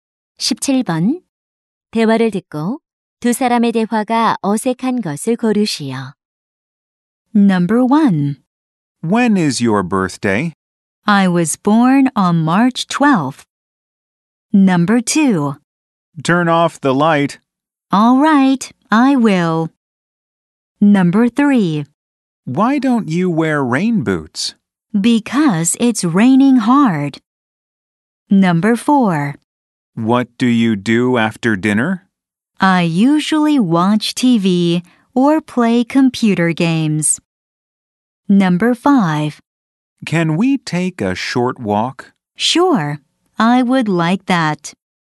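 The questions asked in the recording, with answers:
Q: 대화를 듣고 두 사람의 대화가 어색한 것을 고르시오.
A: 3: Why don't you wear rain boots? / Because it's raining hard.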